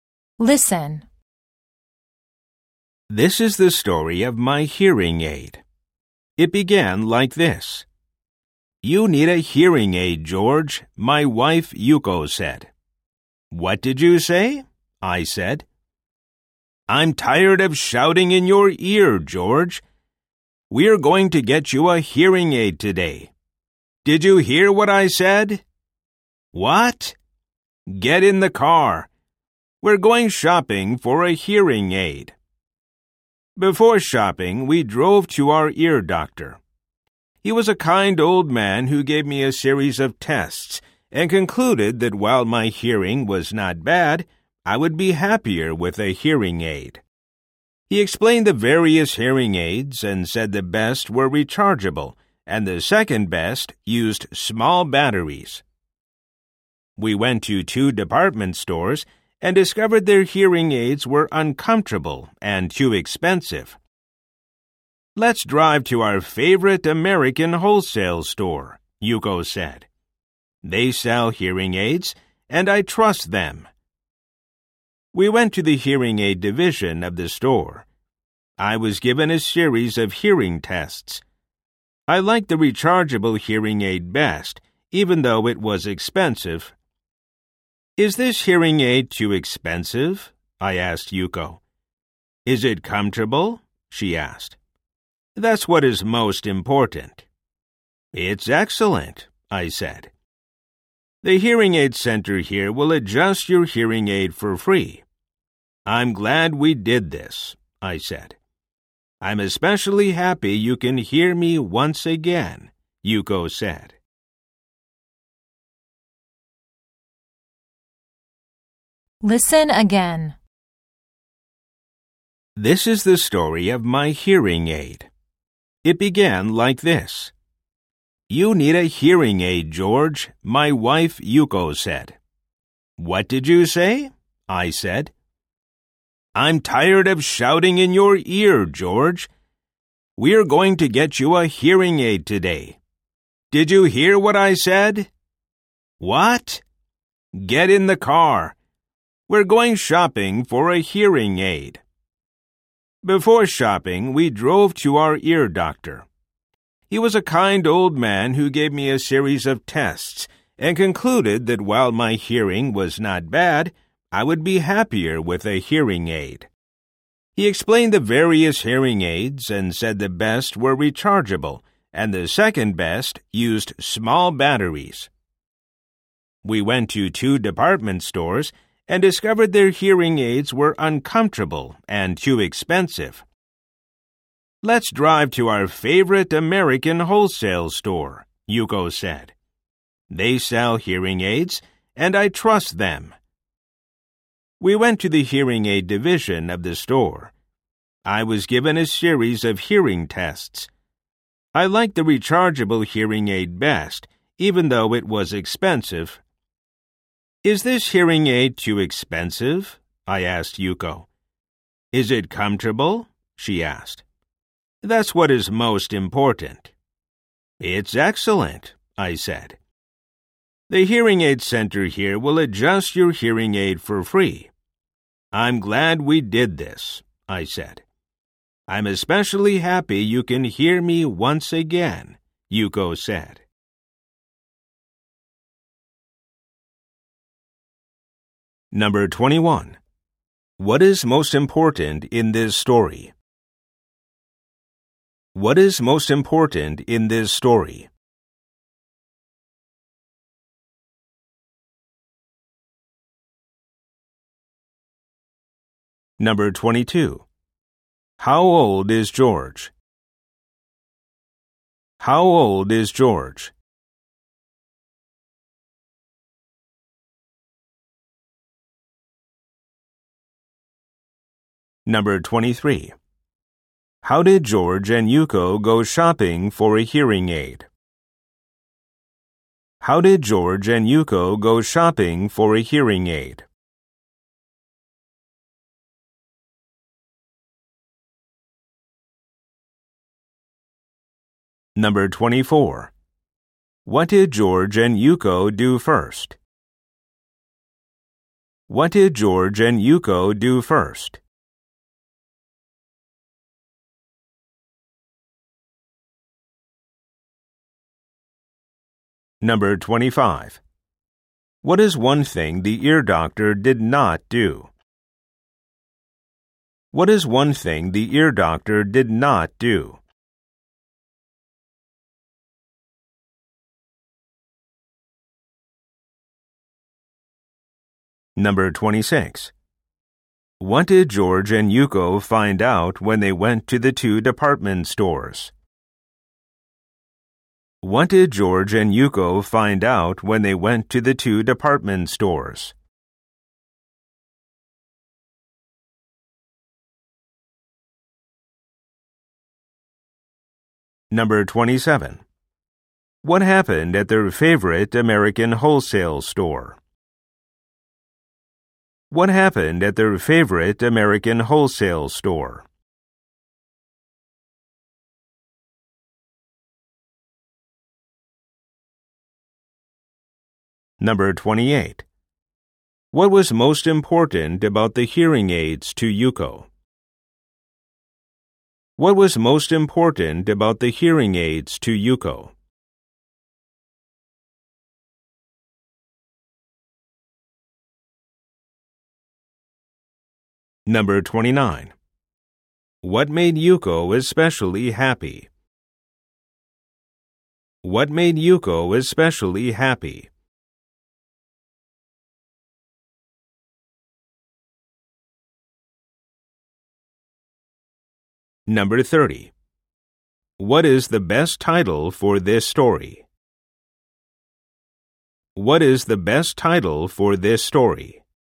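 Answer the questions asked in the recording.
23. By car
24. They drove to their ear doctor
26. Their hearing aids were uncomfortable and too expensive
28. That it is comfortable
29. George can hear her again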